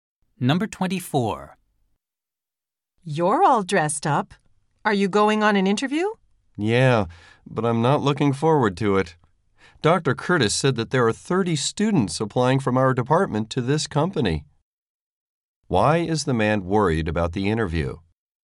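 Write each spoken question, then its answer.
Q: Why is the man worried about the interview?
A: Thirty students from his department are applying.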